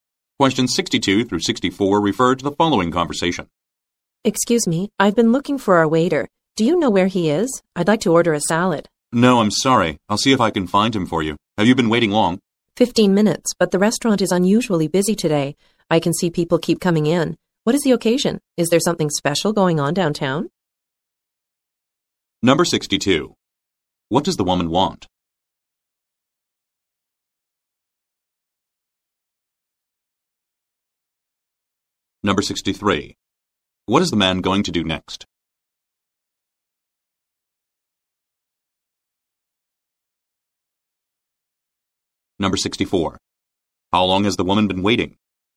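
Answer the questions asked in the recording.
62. To order a salad
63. Look for the waiter
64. 15 minutes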